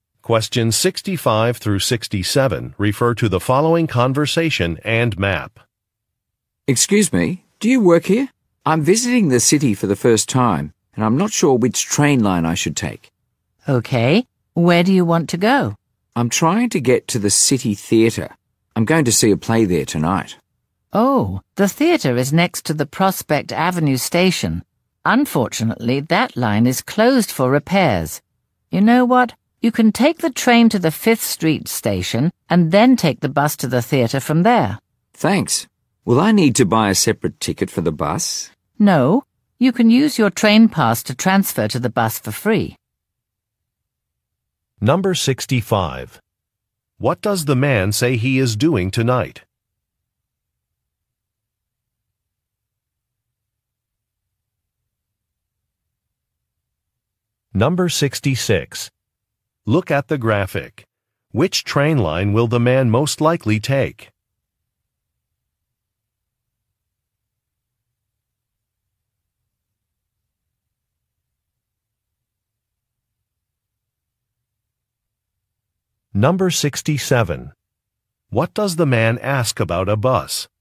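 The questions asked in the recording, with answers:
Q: What does the man say he is doing tonight?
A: Seeing a play at the city theatre

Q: What does the man ask about a bus?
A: Whether he needs to buy a separate ticket for it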